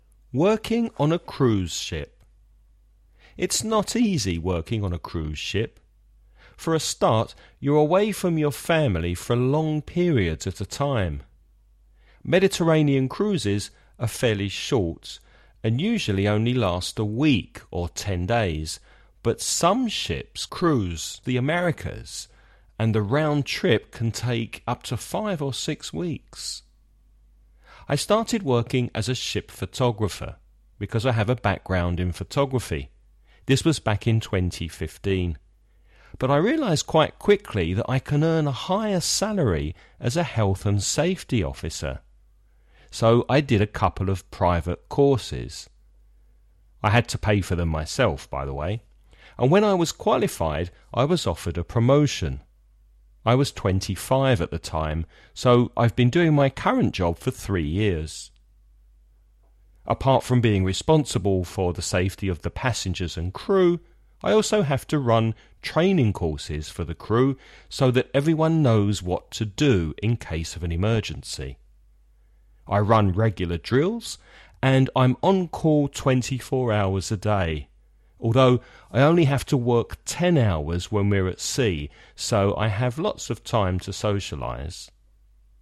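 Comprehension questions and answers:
Listen and write the questions you hear.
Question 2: What was the man's first job?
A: Ship photographer

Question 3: What did the man have to pay for?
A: A couple of private courses

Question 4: How old was he when he got a promotion?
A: 25

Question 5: How many hours a day does he have to work?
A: 10 hours when at sea (though on call 24 hours)

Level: nivel intermedio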